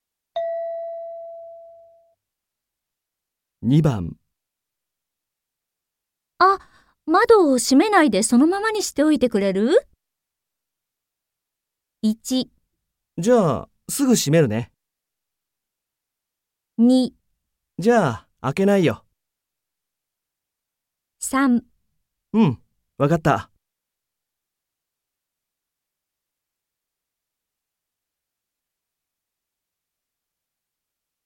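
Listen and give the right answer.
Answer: うん、わかった。

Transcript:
F: あ、窓、閉めないでそのままにしておいてくれる?
M: 1 じゃあ、すぐ閉めるね。

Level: N3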